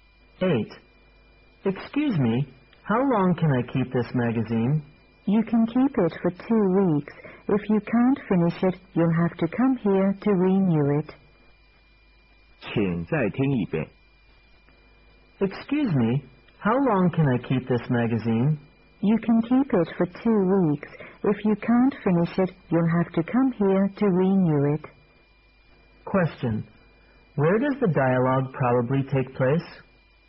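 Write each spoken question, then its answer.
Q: Question. Where does the dialogue probably take place?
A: In a library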